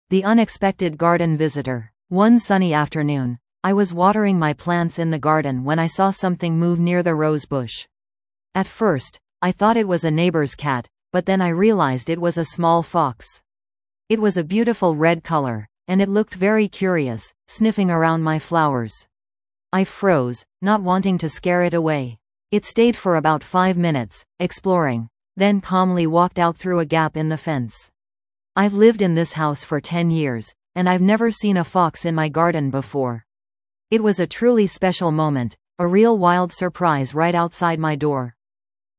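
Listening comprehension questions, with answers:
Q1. What was the speaker doing in the garden?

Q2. What unexpected animal did the speaker see?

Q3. How long had the speaker lived in the house without seeing this animal?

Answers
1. Watering the plants
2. A small red fox
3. 10 years

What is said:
The Unexpected Garden Visitor
One sunny afternoon, I was watering my plants in the garden when I saw something move near the rose bush. At first, I thought it was a neighbor's cat, but then I realized it was a small fox! It was a beautiful red color, and it looked very curious, sniffing around my flowers. I froze, not wanting to scare it away. It stayed for about five minutes, exploring, then calmly walked out through a gap in the fence. I've lived in this house for ten years, and I've never seen a fox in my garden before. It was a truly special moment, a real wild surprise right outside my door.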